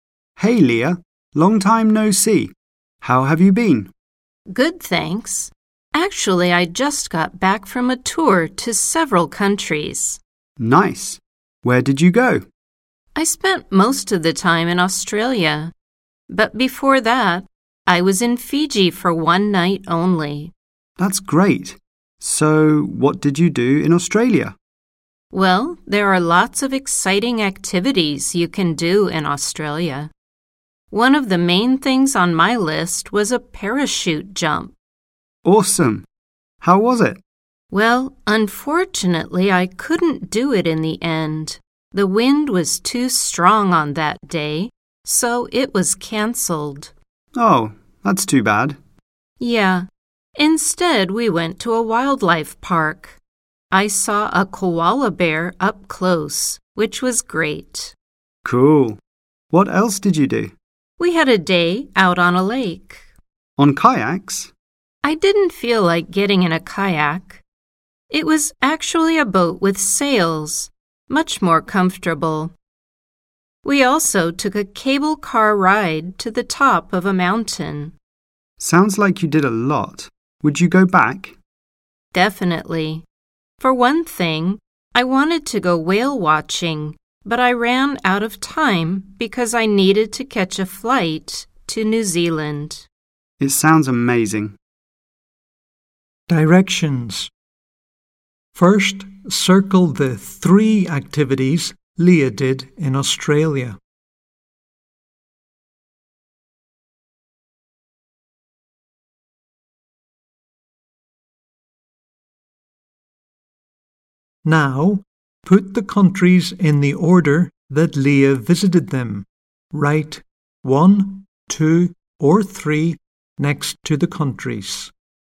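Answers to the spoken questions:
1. visiting a wildlife park, sailing on a lake, riding a cable car
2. 1 Fiji, 2 Australia, 3 New Zealand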